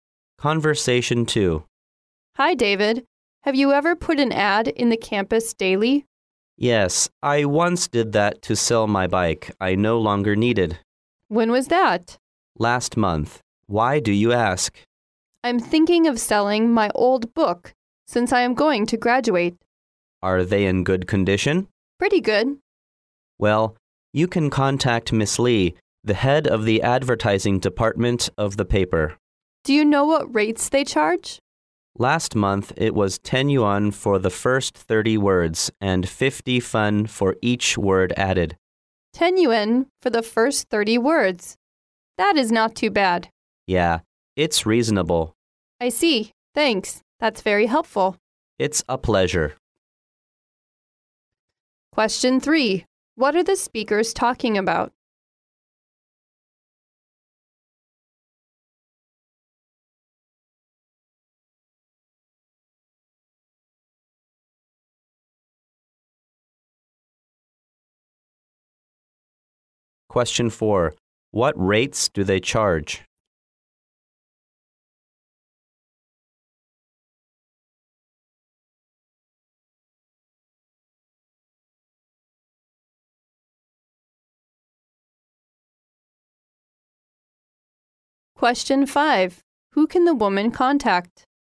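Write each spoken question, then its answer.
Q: What are the speakers talking about?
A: Putting an ad in the campus daily to sell old books

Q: What rates do they charge?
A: 10 yuan for the first 30 words and 50 fen for each extra word

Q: Who can the woman contact?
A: Miss Lee, head of the paper's advertising department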